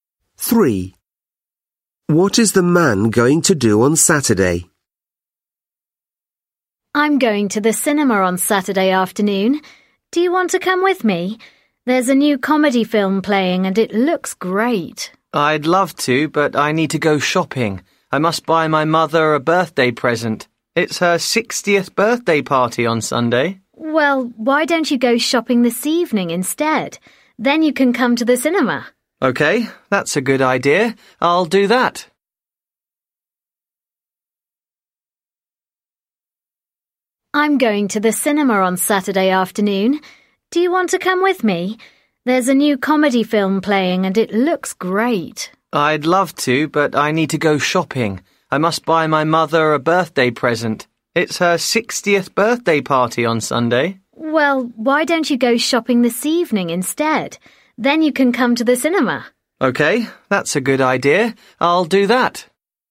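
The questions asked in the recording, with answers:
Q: What is the man going to do on Saturday?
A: Go to the cinema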